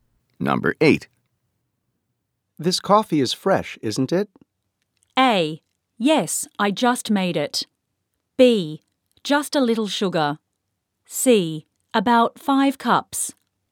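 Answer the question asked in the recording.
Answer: A: Yes, I just made it.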